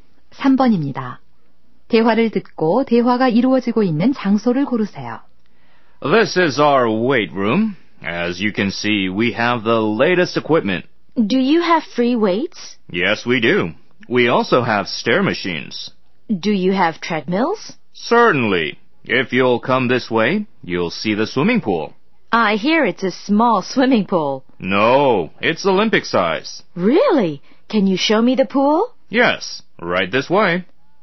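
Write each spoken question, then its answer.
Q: 대화를 듣고 대화가 이루어지고 있는 장소를 고르세요.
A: 헬스클럽(피트니스 센터)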